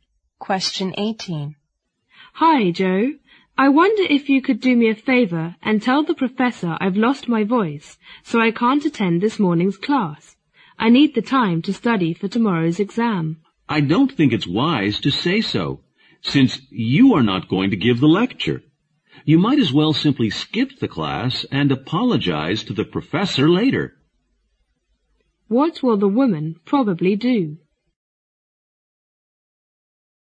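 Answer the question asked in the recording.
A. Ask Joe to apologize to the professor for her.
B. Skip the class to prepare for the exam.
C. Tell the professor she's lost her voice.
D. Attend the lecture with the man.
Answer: B. Skip the class to prepare for the exam.

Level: 六级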